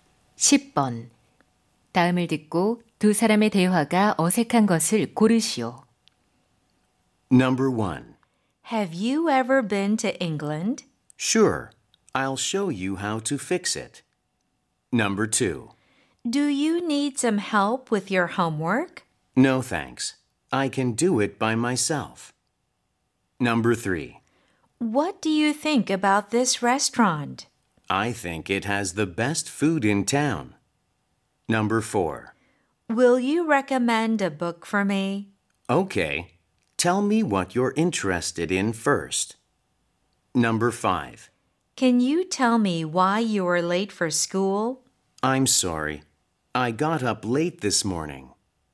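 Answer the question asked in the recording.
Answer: 1: Have you ever been to England? / Sure. I'll show you how to fix it.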